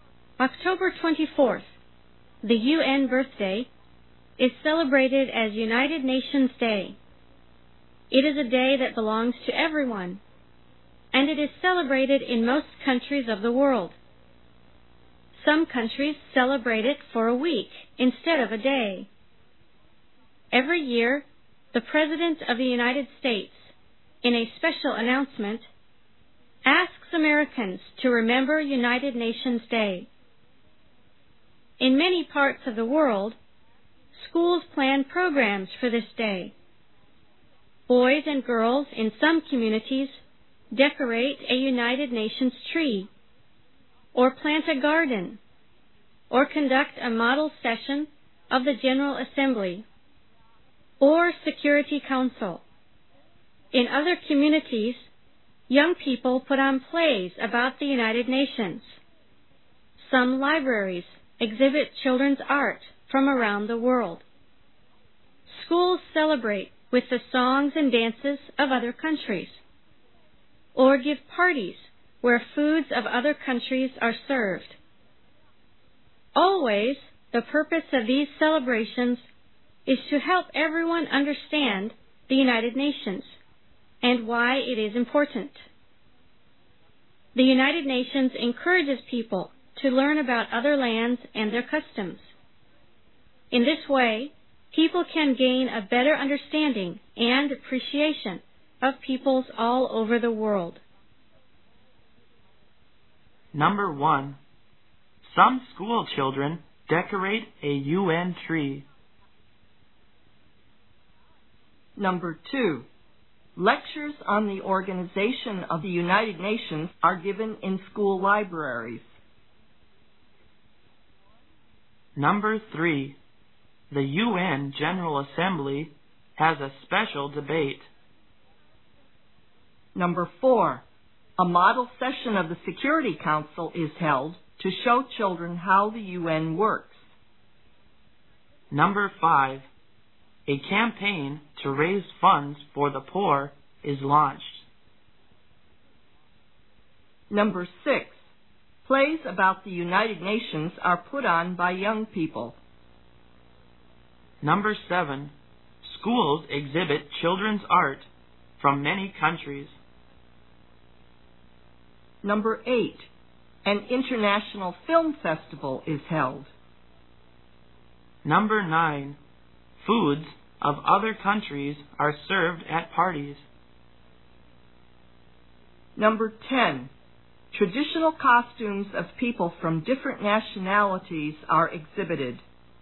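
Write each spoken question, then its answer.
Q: Number one, some school children decorate a UN tree.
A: Based on the passage

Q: Number two, lectures on the Organization of the United Nations are given in school libraries.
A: Not based on the passage (cross)

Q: Number three, the UN General Assembly has a special debate.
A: Not based on the passage (cross)

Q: Number four, a model session of the Security Council is held to show children how the UN works.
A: Based on the passage

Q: Number five, a campaign to raise funds for the poor is launched.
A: Not based on the passage (cross)

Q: Number six, plays about the United Nations are put on by young people.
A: Based on the passage

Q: Number eight, an international film festival is held.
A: Not based on the passage (cross)

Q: Number nine, foods of other countries are served at parties.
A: Based on the passage

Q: Number ten, traditional costumes of people from different nationalities are exhibited.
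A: Not based on the passage (cross)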